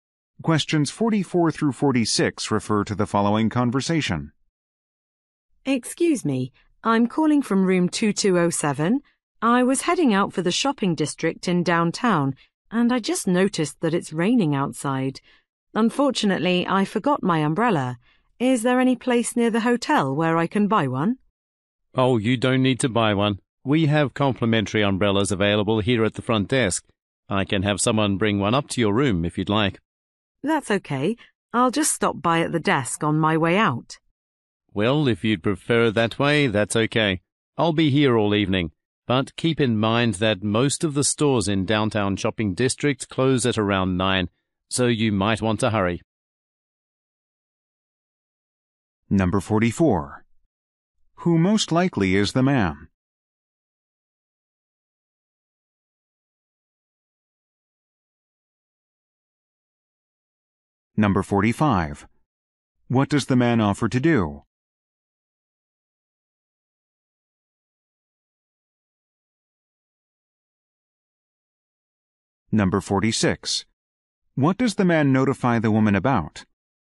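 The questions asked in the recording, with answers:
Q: Who most likely is the man?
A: A hotel front desk clerk

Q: What does the man offer to do?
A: Have an umbrella brought up to her room

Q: What does the man notify the woman about?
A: Most downtown stores close around 9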